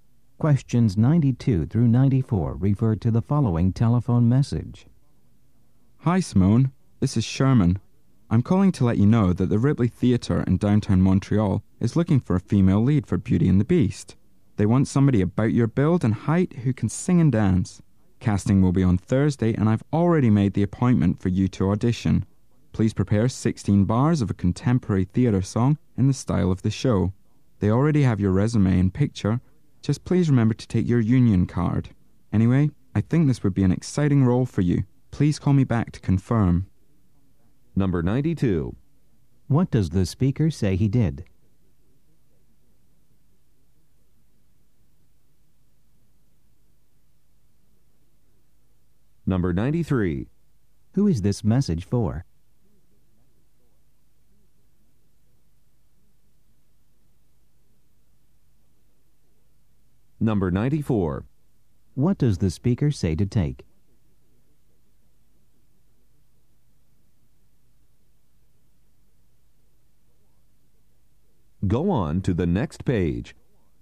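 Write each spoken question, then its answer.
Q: What does the speaker say he did?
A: Made an audition appointment for her

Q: Who is this message for?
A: Simone, an actress/performer

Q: What does the speaker say to take?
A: Her union card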